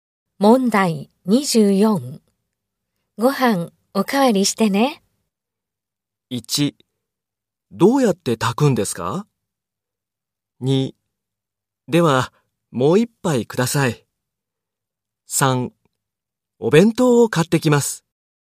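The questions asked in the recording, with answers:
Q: ご飯おかわりしてね。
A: 2: では、もう一杯ください。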